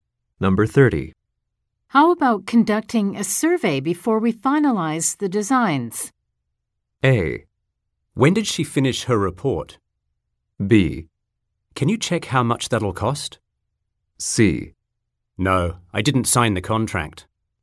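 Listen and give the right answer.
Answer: B: Can you check how much that'll cost?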